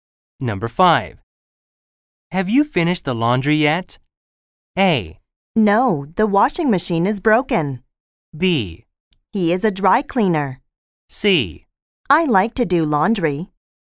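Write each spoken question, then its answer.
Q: Have you finished the laundry yet?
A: A: No, the washing machine is broken.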